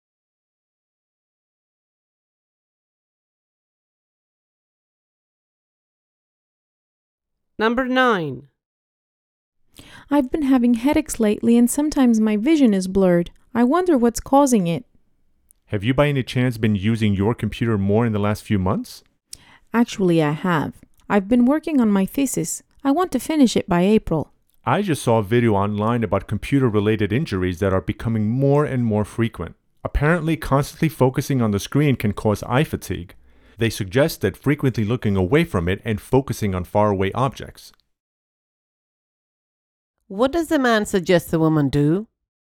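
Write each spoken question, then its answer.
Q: What does the man suggest the woman do?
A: Often look away from the screen and focus on faraway objects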